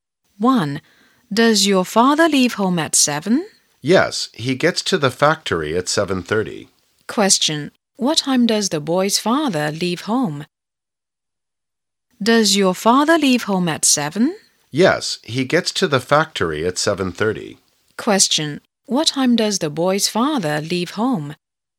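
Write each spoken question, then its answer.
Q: What time does the boy's father leave home?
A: At 7 o'clock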